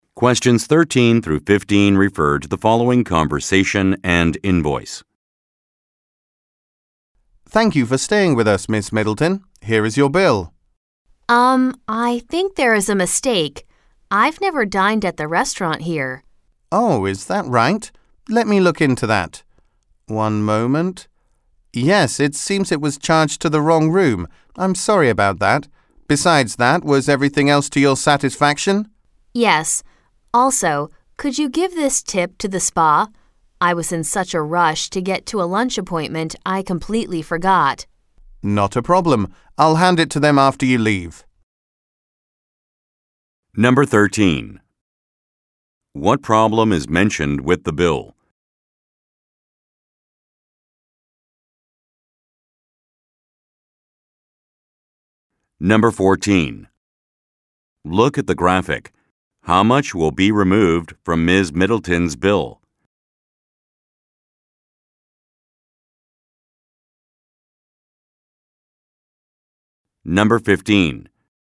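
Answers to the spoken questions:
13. She was charged for a restaurant meal she never had (charged to the wrong room)
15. She forgot to leave a tip because she was rushing to a lunch appointment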